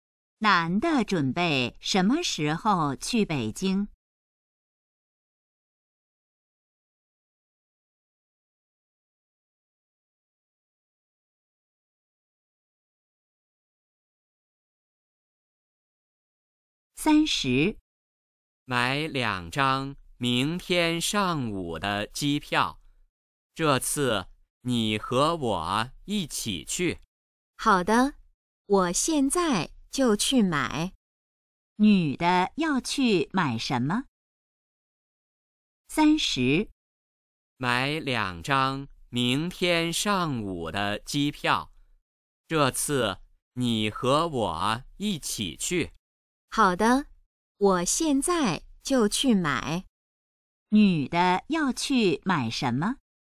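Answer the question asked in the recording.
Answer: 机票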